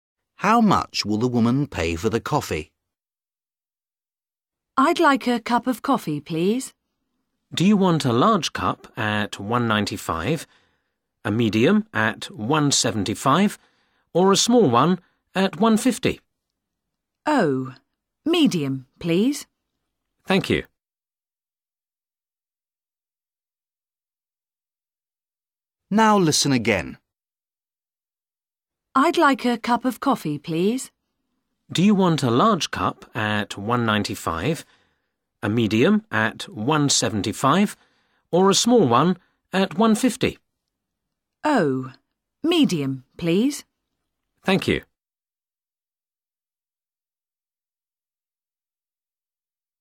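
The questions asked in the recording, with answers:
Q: How much will the woman pay for the coffee?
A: £1.75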